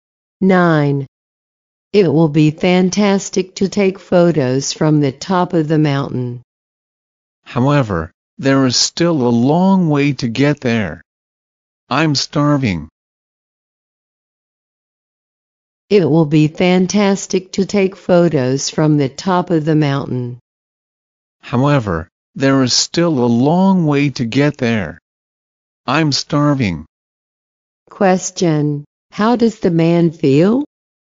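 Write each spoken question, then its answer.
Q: Question: How does the man feel?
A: Hungry.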